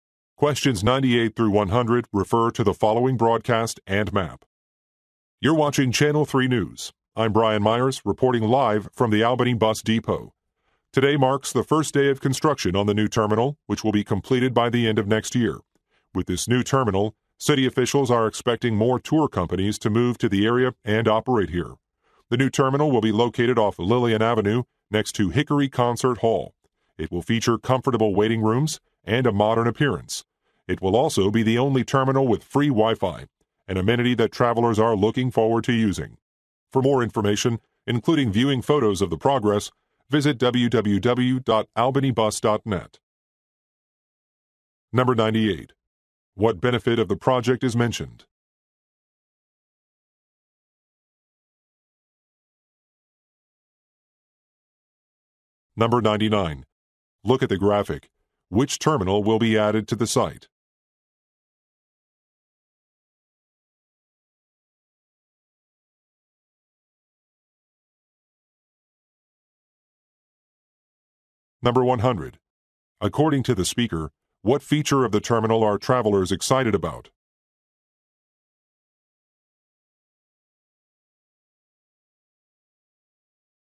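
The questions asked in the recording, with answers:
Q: What benefit of the project is mentioned?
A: More tour companies will come to the area

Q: According to the speaker, what feature of the terminal are travelers excited about?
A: Free Wi-Fi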